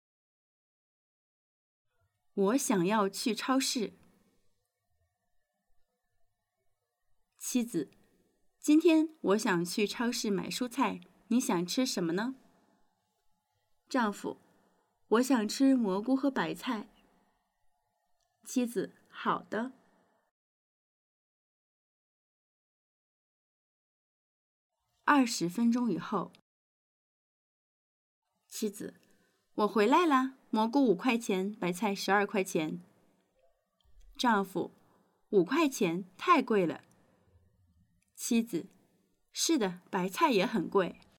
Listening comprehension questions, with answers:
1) 蔬菜价格贵不贵?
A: 贵

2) 丈夫想吃什么?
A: 蘑菇和白菜

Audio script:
我想要去超市 妻子:今天我想要去超市买蔬菜,你想吃什么呢? 丈夫:我想吃蘑菇和白菜。 妻子:好的。

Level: beginner